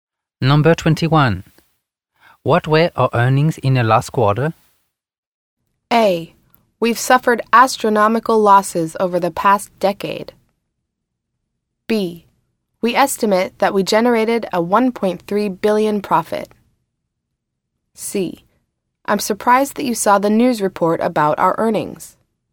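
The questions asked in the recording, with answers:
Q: What were our earnings in the last quarter?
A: B: We estimate that we generated a $1.3 billion profit.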